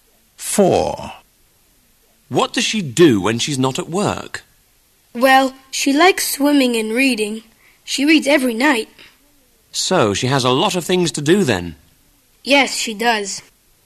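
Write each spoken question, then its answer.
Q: What does she do when she's not at work?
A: Swimming and reading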